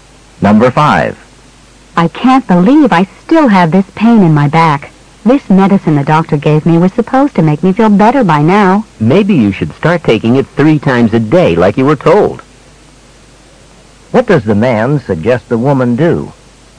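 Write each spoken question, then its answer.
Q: What does the man suggest the woman do?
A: Take the medicine three times a day as instructed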